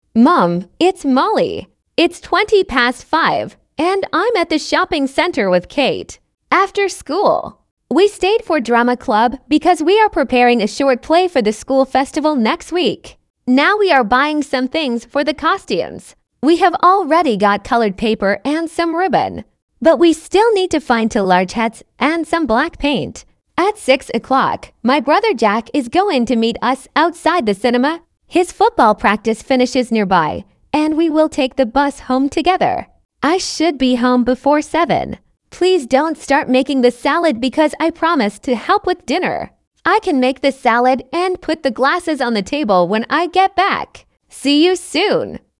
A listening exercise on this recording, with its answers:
Прослушайте текст и определите, какие из приведённых утверждений A–E соответствуют содержанию текста — 1 (True), а какие не соответствуют — 2 (False). Вы услышите текст дважды.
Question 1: Molly is calling from the school library.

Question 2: Molly stayed after school for a drama club meeting.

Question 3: Molly and Kate have already bought everything they need.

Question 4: Molly is going to meet her brother later today.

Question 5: Molly plans to help with dinner when she gets home.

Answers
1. False
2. True
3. False
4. True
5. True

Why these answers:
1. Молли звонит из торгового центра, а не из школьной библиотеки.
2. После школы Молли осталась на занятии театрального кружка.
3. Девочки уже купили бумагу и ленту, но им всё ещё нужны шляпы и чёрная краска.
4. В шесть часов Молли собирается встретиться со своим братом Джеком.
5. Молли обещала помочь с ужином: приготовить салат и поставить стаканы на стол.

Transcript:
After school, we stayed for drama club because we are preparing a short play for the school festival next week.
Now we are buying some things for the costumes. We have already got coloured paper and some ribbon, but we still need to find two large hats and some black paint.
At six o'clock, my brother Jack is going to meet us outside the cinema. His football practice finishes nearby, and we will take the bus home together.
I should be home before seven. Please don't start making the salad because I promised to help with dinner. I can make the salad and put the glasses on the table when I get back.
See you soon.